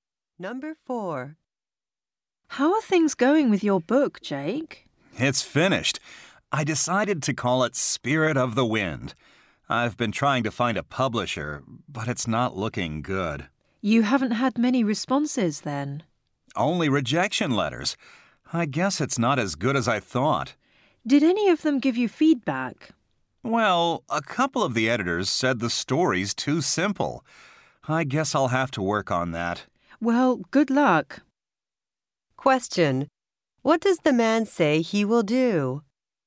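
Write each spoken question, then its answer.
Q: What does the man say he will do?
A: Make his story less simple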